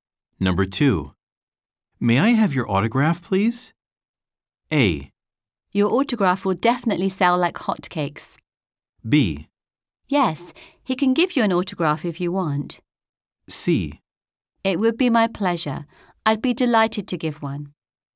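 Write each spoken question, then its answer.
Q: May I have your autograph, please?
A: C: It would be my pleasure. I'd be delighted to give one.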